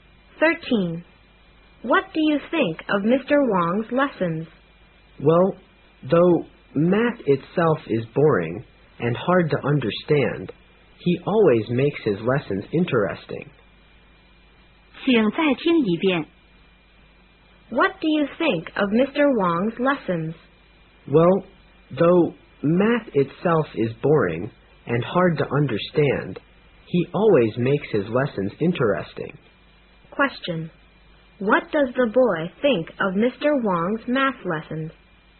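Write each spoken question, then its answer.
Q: What does the boy think of Mr. Wong's math lessons?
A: They are interesting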